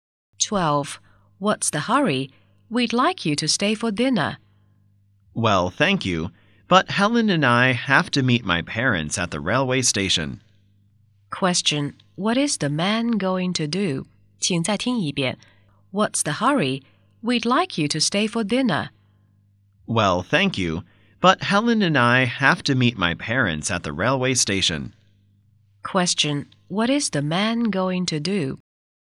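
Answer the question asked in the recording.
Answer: Meet his parents at the railway station.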